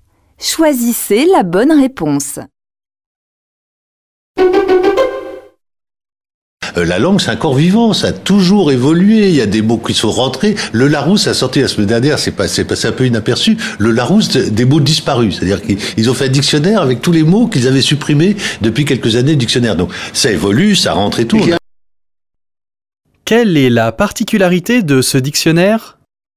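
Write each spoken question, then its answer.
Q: Quelle est la particularité de ce dictionnaire ?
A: Il rassemble les mots supprimés du dictionnaire ces dernières années (les mots disparus).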